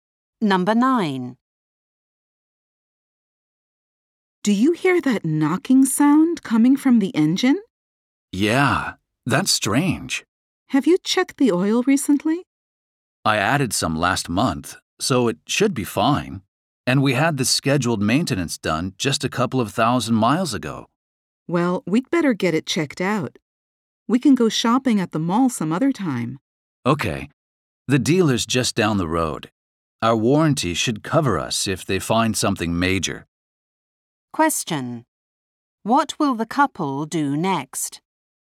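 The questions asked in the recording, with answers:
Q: What will the couple do next?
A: Take the car to the dealer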